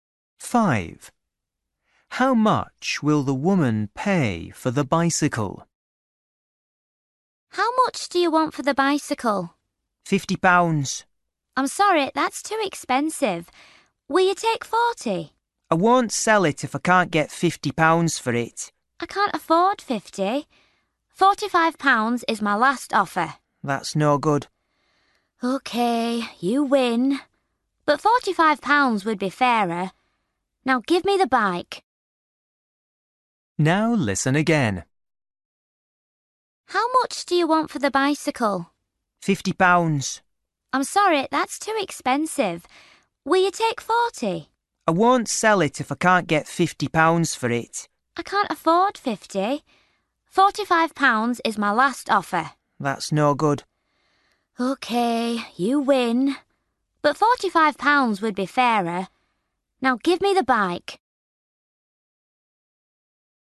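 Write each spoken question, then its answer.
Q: How much will the woman pay for the bicycle?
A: £50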